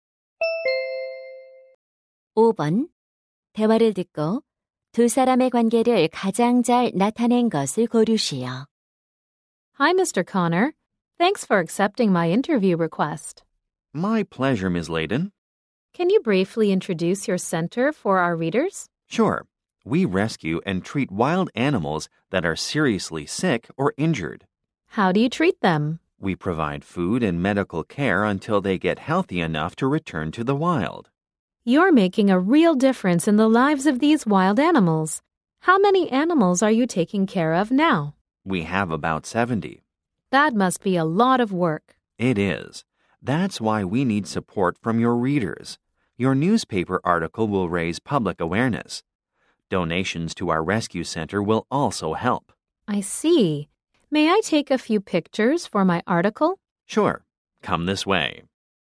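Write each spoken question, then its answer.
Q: 대화를 듣고 두 사람의 관계를 가장 잘 나타낸 것을 고르시오.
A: 신문 기자 - 야생동물 구조센터 운영자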